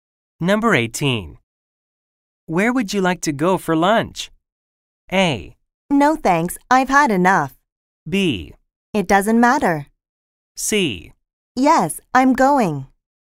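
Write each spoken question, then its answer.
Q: Where would you like to go for lunch?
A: B: It doesn't matter.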